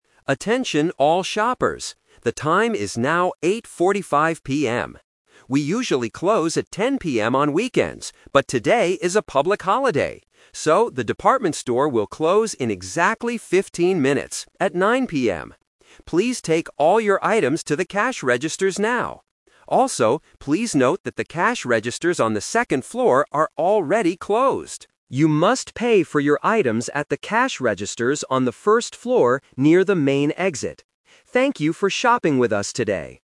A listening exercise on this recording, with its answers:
A store announcer is making an announcement over the PA system about the store closing. Listen to the announcement and choose the correct answer (A, B, or C) for each question.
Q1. What time will the department store close TODAY?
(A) At 8:45 PM.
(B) At 9:00 PM.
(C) At 10:00 PM.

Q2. Why is the store closing early?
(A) Because it is a public holiday.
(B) Because the weather is bad.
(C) Because there are no customers.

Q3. Where should the customers go to pay?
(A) To the second floor.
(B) To the first floor.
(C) To the customer service desk.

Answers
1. (B) At 9:00 PM.
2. (A) Because it is a public holiday.
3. (B) To the first floor.

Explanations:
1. This is "The Twist". The announcer says they usually close at 10:00 PM, but today they "will close in exactly fifteen minutes, at 9:00 PM." Why the trap is wrong: Option (C) is the trap because it is the normal closing time, not today's time. Option (A) is the current time when the announcer is speaking.
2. The announcer gives the reason for closing early: "but today is a public holiday." Why the trap is wrong: Options (B) and (C) are plausible reasons for a store to close early in real life, but the announcer never mentions the weather or the number of customers.
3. The announcer gives a clear instruction: "You must pay for your items at the cash registers on the first floor..." Why the trap is wrong: Option (A) is the trap. The second floor is mentioned, but those registers "are already closed." Option (C) is a plausible place in a store, but it is not where they need to pay.

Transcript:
We usually close at 10:00 PM on weekends, but today is a public holiday. So, the department store will close in exactly fifteen minutes, at 9:00 PM. Please take all your items to the cash registers now. Also, please note that the cash registers on the second floor are already closed. You must pay for your items at the cash registers on the first floor near the main exit. Thank you for shopping with us today.

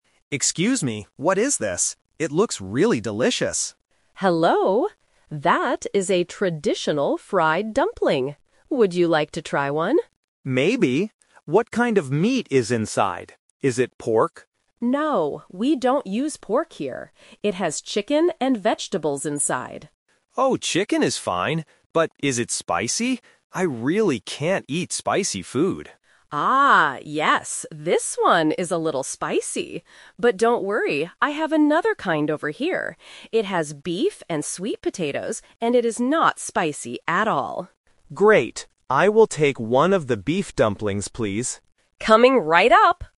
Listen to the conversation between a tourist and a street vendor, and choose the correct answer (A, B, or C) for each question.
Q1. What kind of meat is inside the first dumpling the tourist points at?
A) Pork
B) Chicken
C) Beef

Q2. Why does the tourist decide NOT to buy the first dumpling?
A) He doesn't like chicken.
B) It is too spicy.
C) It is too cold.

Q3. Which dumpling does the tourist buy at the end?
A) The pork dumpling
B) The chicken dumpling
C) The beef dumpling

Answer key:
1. B) Chicken
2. B) It is too spicy.
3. C) The beef dumpling

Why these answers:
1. The vendor clearly says about the first dumpling, "It has chicken and vegetables inside." Option (A) is the trap; the tourist asks if it is pork, but the vendor says they don't use pork. Option (C) is a trap; beef is in the second dumpling.
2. The tourist says, "I really can't eat spicy food," and the vendor confirms the first dumpling is "a little spicy." Option (A) is a trap; the tourist actually says "chicken is fine," so the meat is not the problem. Option (C) is a plausible complaint about street food, but it is never mentioned.
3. Because he cannot eat spicy food, the tourist accepts the vendor's second offer and says, "I will take one of the beef dumplings, please." Option (B) is the trap; it is the dumpling they talked about first, but he rejected it. Option (A) is also a trap; the vendor does not sell pork.

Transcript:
Tourist: Excuse me, what is this? It looks really delicious.
Vendor: Hello! That is a traditional fried dumpling. Would you like to try one?
Tourist: Maybe. What kind of meat is inside? Is it pork?
Vendor: No, we don't use pork here. It has chicken and vegetables inside.
Tourist: Oh, chicken is fine. But is it spicy? I really can't eat spicy food.
Vendor: Ah, yes, this one is a little spicy. But don't worry. I have another kind over here. It has beef and sweet potatoes, and it is not spicy at all.
Tourist: Great! I will take one of the beef dumplings, please.
Vendor: Coming right up!

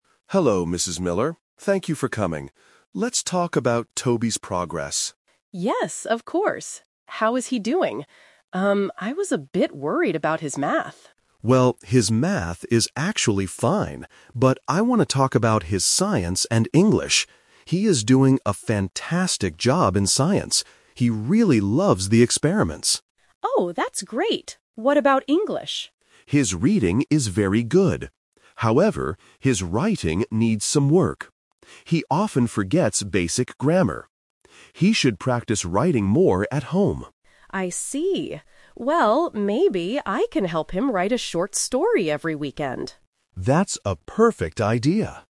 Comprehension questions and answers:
Listen to a short conversation between a teacher (Mr. Evans) and a parent (Mrs. Miller) about Toby's progress. Then, choose the best answer (A, B, or C) for each question below.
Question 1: What subject was Mrs. Miller worried about before the meeting?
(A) Science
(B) Math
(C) History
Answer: (B) Math

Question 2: What skill does Toby need to improve?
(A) Writing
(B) Reading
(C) Speaking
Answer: (A) Writing

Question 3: How is Mrs. Miller going to help Toby at home?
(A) By reading books with him.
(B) By doing Science experiments.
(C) By helping him write stories.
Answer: (C) By helping him write stories.

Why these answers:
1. Mrs. Miller says clearly at the beginning, "I was a bit worried about his Math."
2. Mr. Evans says, "However, his writing needs some work," which means he needs to improve it.
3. Mrs. Miller suggests, "...maybe I can help him write a short story every weekend."

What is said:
Evans: Hello, Mrs. Miller. Thank you for coming. Let's talk about Toby's progress.
Mrs. Miller: Yes, of course. How is he doing? Um, I was a bit worried about his Math.
Evans: Well, his Math is actually fine. But I want to talk about his Science and English. He is doing a fantastic job in Science. He really loves the experiments.
Mrs. Miller: Oh, that's great! What about English?
Evans: His reading is very good. However, his writing needs some work. He often forgets basic grammar. He should practice writing more at home.
Mrs. Miller: I see. Well, maybe I can help him write a short story every weekend.

